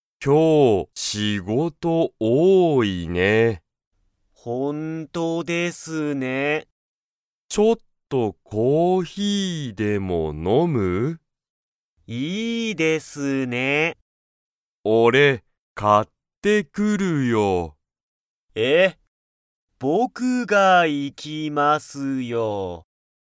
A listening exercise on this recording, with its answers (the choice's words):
Comprehension Quiz (Skip if you don't understand the conversation yet)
今日(きょう)は、仕事(しごと)が多(おお)いですか?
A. はい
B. いいえ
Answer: はい

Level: Level 1